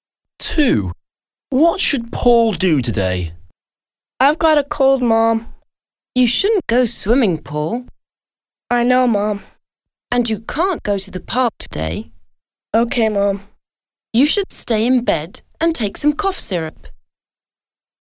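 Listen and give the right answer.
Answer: Stay in bed and take some cough syrup.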